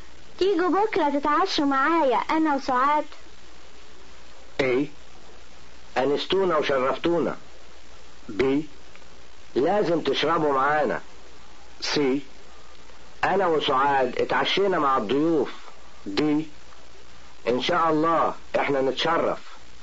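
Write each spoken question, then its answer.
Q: تيجوا بكرة تتعشوا معايا انا وسعاد.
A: D: ان شاء الله احنا نتشرف.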